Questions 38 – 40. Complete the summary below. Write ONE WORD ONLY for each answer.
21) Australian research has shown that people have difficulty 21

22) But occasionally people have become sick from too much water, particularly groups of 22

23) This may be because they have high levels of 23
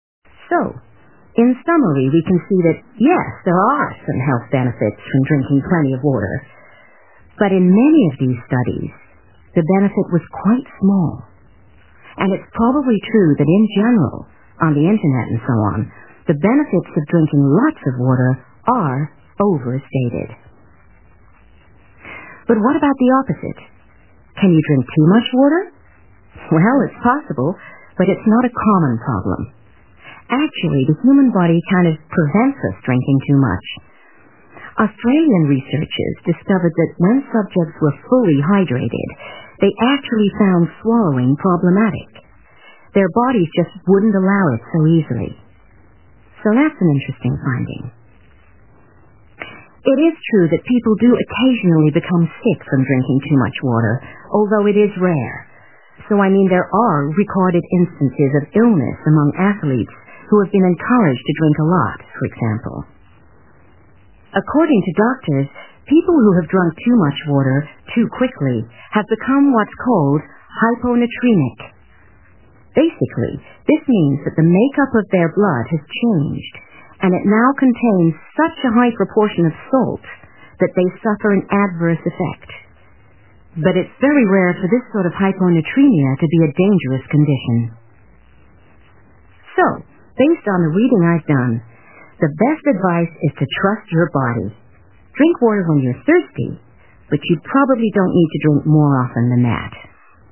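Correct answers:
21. swallowing
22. athletes
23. salt

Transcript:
And (Q36) the less hydrated group were affected more frequently by headaches compared to those who drank more water.
In the second study, the research subjects were all male. And this time, a lack of water in the body was associated with a number of findings. In particular, (Q37) the subjects in this group (= male) reported increased (= more) feelings of anxiety when dehydrated (= with insufficient water).
So, in summary we can see that, yes, there are some health benefits from drinking plenty of water. But in many of these studies, the benefit was quite small. And it's probably true that in general, on the internet and so on, the benefits of drinking lots of water are overstated.
Too much water?
But what about the opposite – can you drink too much water? Well, it's possible, but it's not a common problem. Actually, the human body kind of prevents us drinking too much. 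(Q38) Australian researchers discovered that when subjects were fully hydrated, they actually found swallowing problematic (= have difficulty) – their bodies just wouldn't allow it so easily. ) So that's an interesting finding.
It is true that (Q39) people do occasionally become sick from drinking too much water, although it is rare. So, I mean, there are recorded instances of illness among athletes who have been encouraged to drink a lot, for example.
According to doctors, people who have drunk too much water, too quickly, have become what's called 'hyponatremic'. Basically, this means that (Q40) the make-up of their blood has changed and it now contains such a high proportion (= high levels) of salt that they suffer an adverse effect.
So, based on the reading I've done, the best advice is to trust your body. Drink water when you're thirsty, but you probably don't need to drink more often than that.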